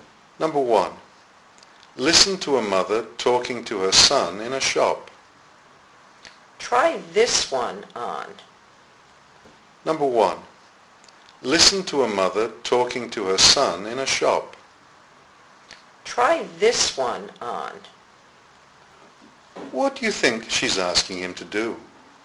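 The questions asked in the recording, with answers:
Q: What do you think she's asking him to do?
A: To try on some clothes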